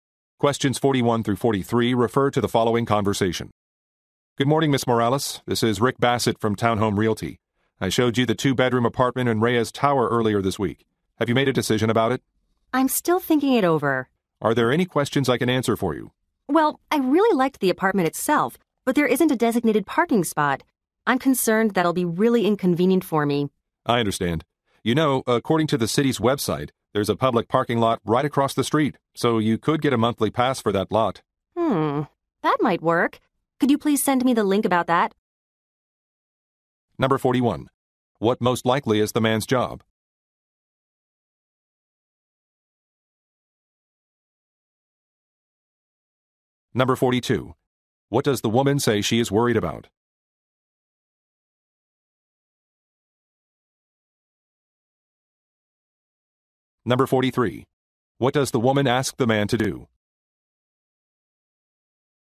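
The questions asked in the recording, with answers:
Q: What most likely is the man's job?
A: Real estate agent

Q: What does the woman say she is worried about?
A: The apartment has no designated parking spot

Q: What does the woman ask the man to do?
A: Send her the link about the public parking lot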